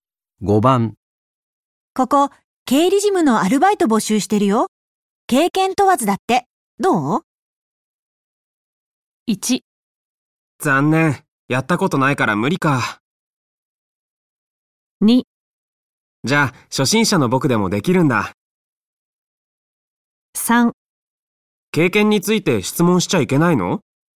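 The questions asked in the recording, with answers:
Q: ここ、経理事務のアルバイト募集してるよ。経験問わずだって。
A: 2: じゃあ、初心者の僕でもできるんだ。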